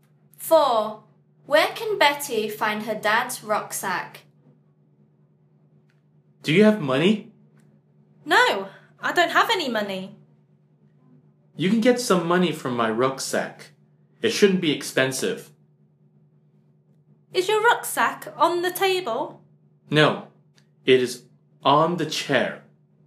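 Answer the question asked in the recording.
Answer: on the chair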